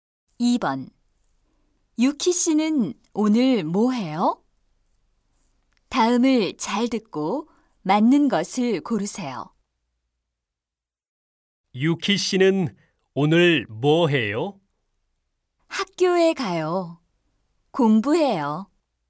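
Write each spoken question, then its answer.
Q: 유키 씨는 오늘 뭐 해요?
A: 학교에 가서 공부해요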